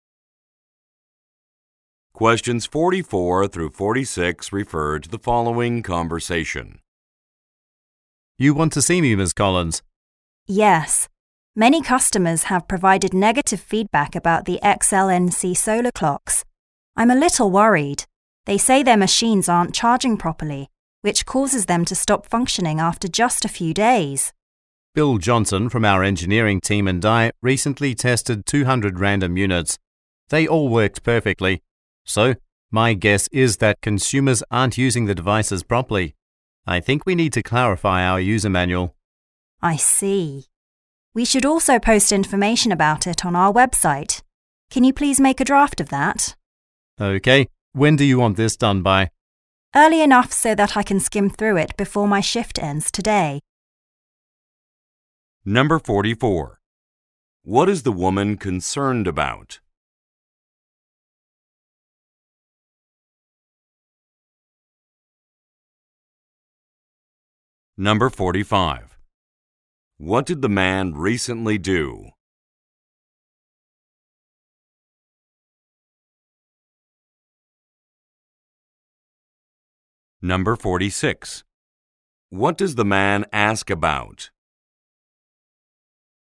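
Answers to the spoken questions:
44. Negative customer feedback about the solar clocks
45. Tested 200 random units
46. When the draft should be done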